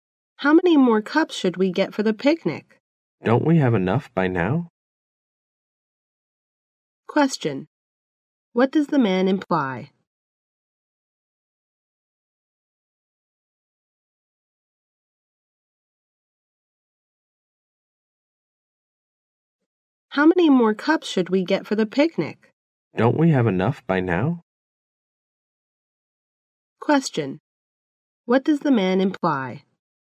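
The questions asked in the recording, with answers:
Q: What does the man imply?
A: They already have enough cups.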